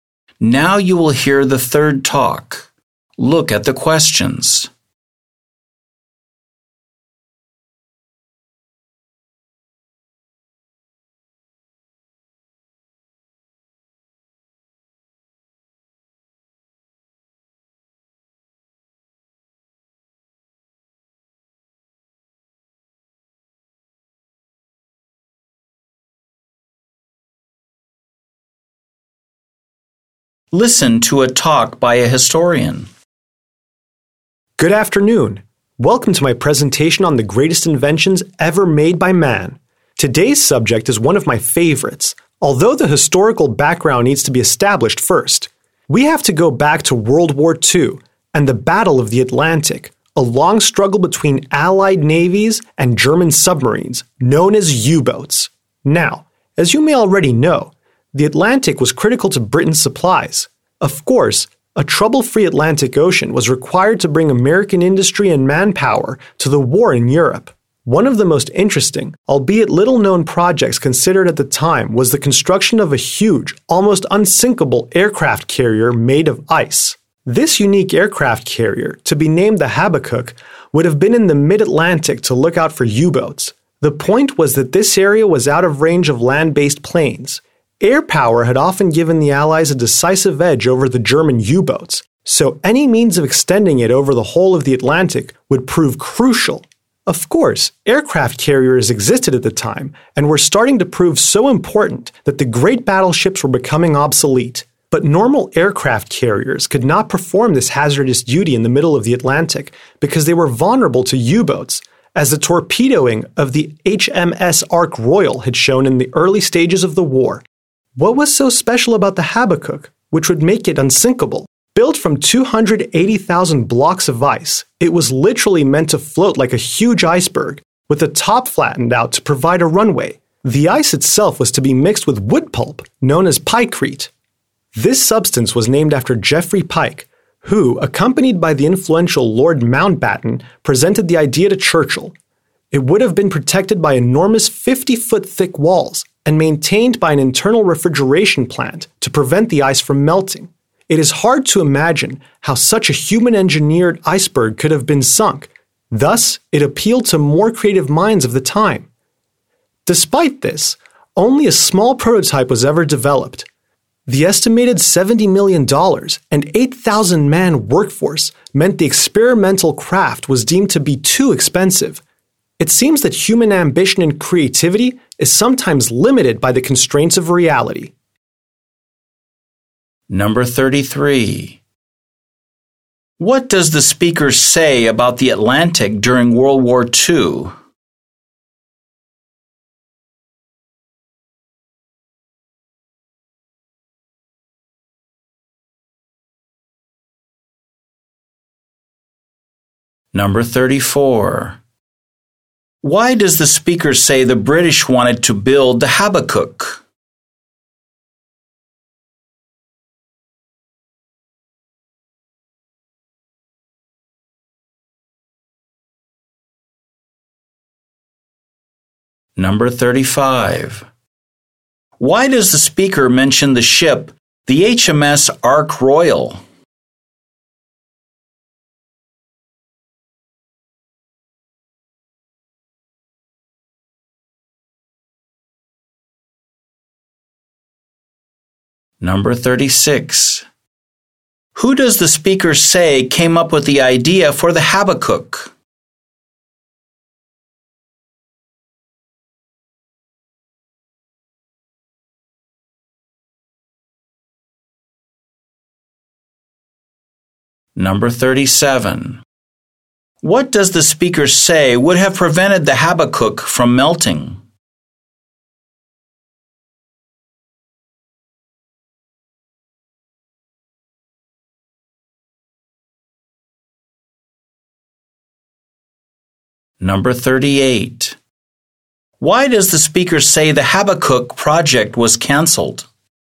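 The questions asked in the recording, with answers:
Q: What does the speaker say about the Atlantic during World War II?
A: It was critical to Britain's supplies

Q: Why does the speaker say the British wanted to build the Habakkuk?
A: To look out for U-boats in the mid-Atlantic, out of range of land-based planes

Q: Why does the speaker mention the ship, the HMS Ark Royal?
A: To show that normal aircraft carriers were vulnerable to U-boats

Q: Who does the speaker say came up with the idea for the Habakkuk?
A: Geoffrey Pike

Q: What does the speaker say would have prevented the Habakkuk from melting?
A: An internal refrigeration plant

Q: Why does the speaker say the Habakkuk project was canceled?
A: It was too expensive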